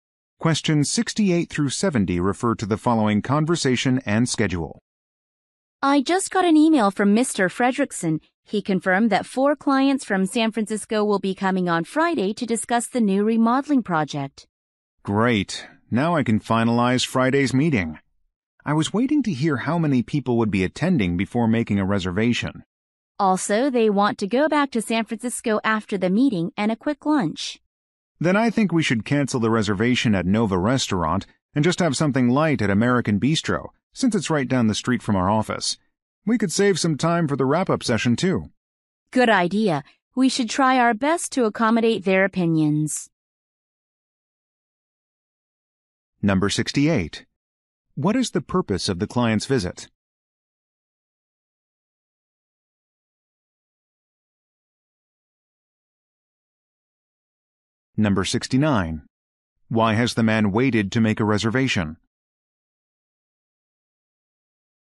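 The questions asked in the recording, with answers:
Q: What is the purpose of the client's visit?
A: To discuss a new remodeling project

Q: Why has the man waited to make a reservation?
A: He needed to know how many people would attend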